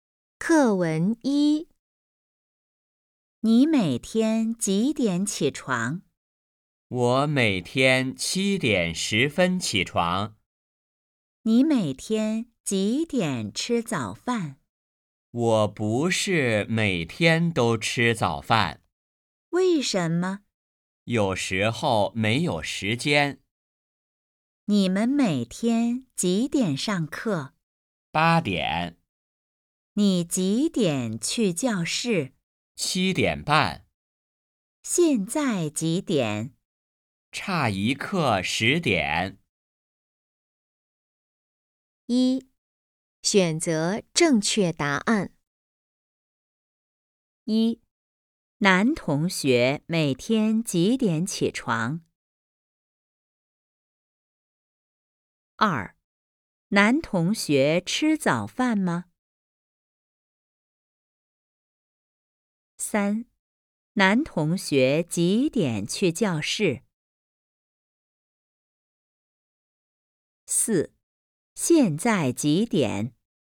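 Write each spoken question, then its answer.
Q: 现在几点?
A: 差一刻10:00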